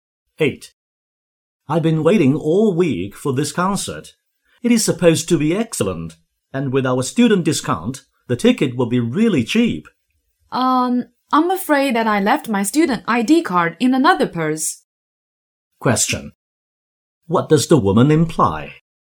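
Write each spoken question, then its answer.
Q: What does the woman imply?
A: They may not get the student discount because she left her ID card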